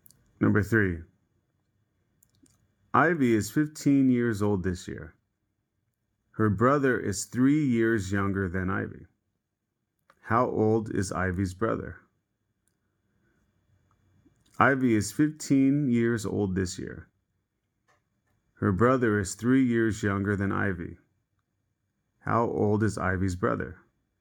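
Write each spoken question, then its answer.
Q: How old is Ivy's brother?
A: 12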